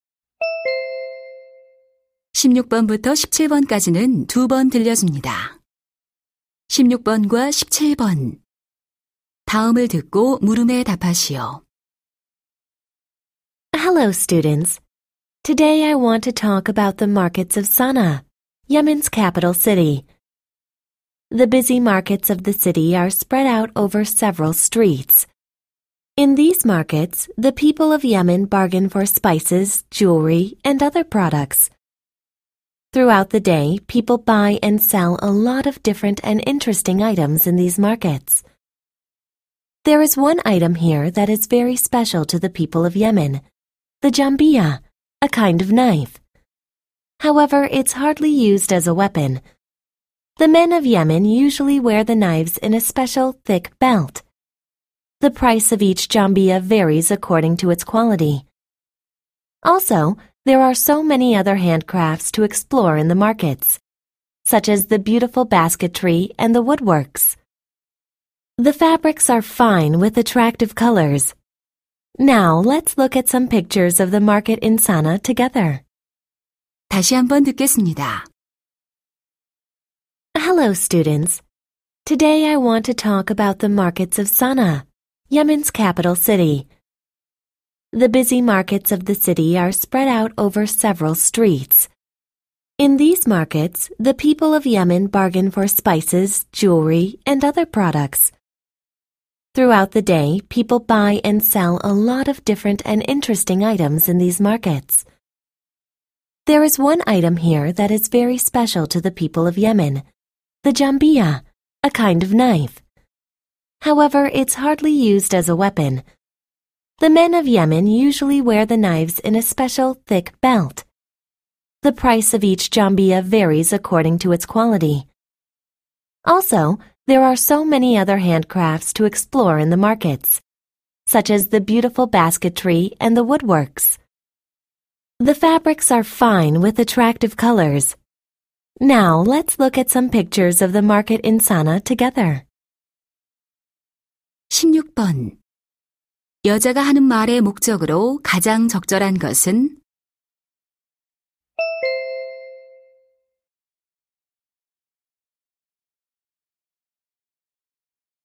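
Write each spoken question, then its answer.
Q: 여자가 하는 말의 목적으로 가장 적절한 것은?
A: 예멘 사나의 시장을 소개하려고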